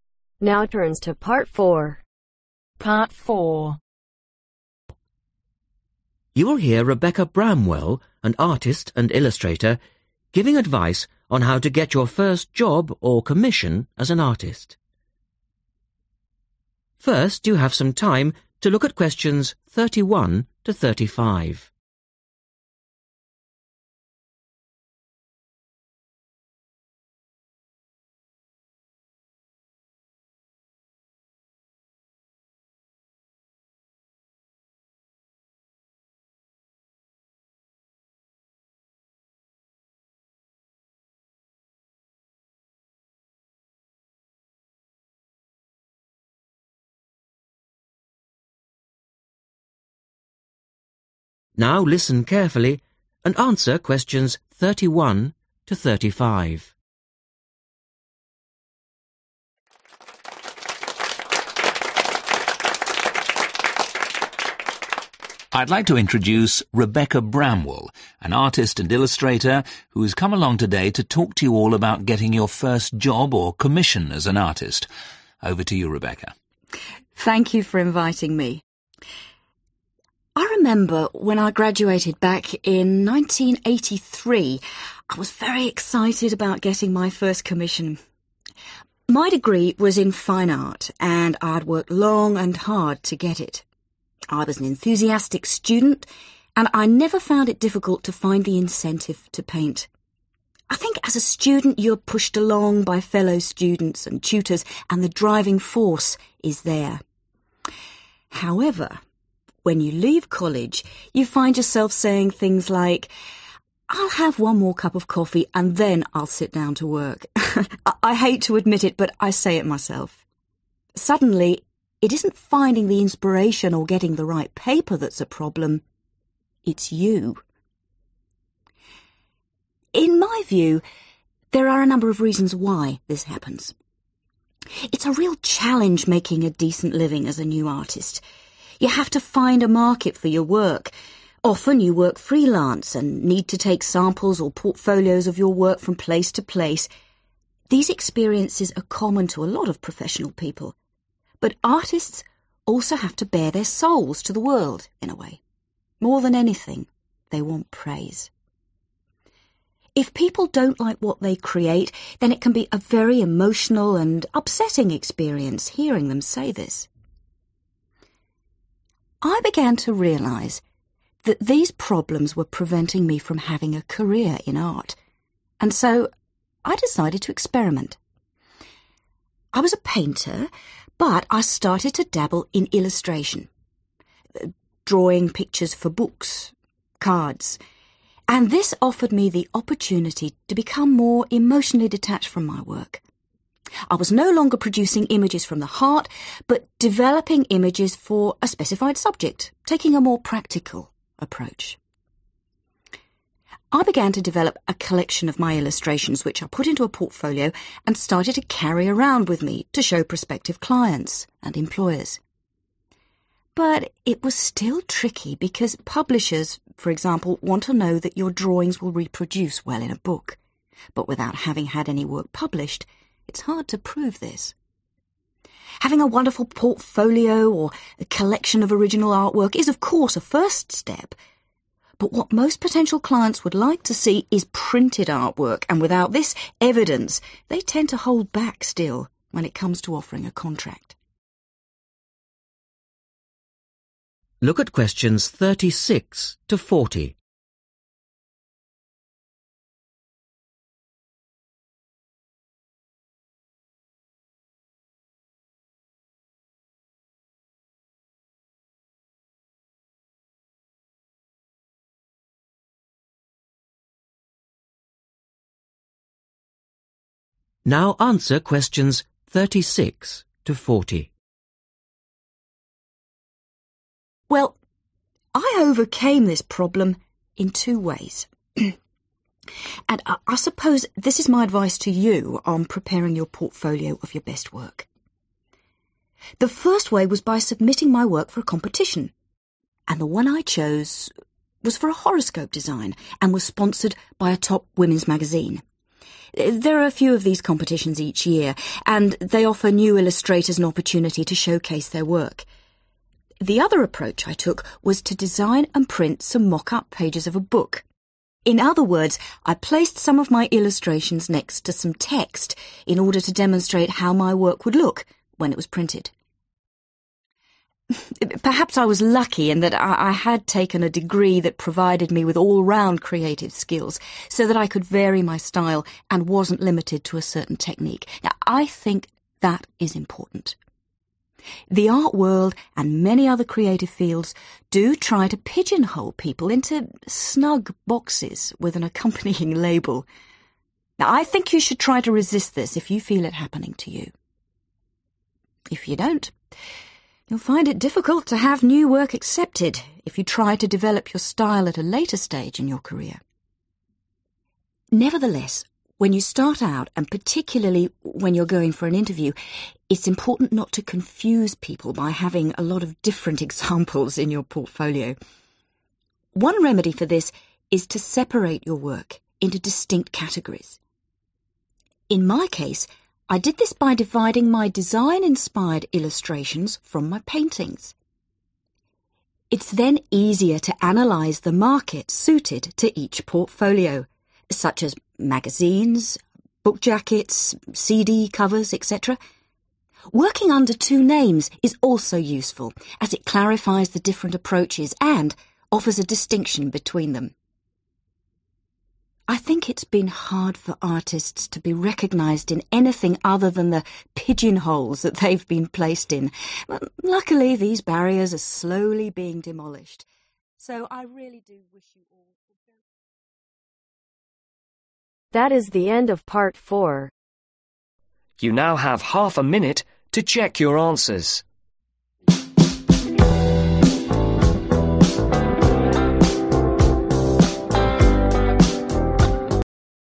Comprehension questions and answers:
Circle the correct letter A-C.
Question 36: Get some artwork printed in magazines by entering a (36)............ .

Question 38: Make an effort to use a variety of artistic (38)............ .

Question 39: Aim for recognition by dividing work into distinct (39)............ .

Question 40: Possibly use two (40)............ .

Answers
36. Competition (s)
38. Styles/Techniques
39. Categories
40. Names